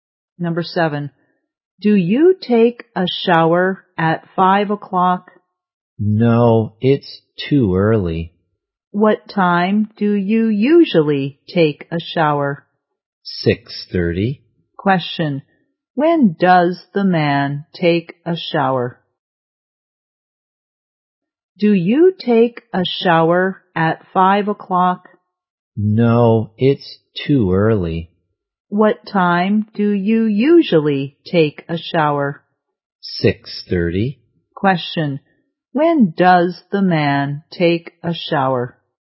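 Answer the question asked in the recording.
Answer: At 6:30.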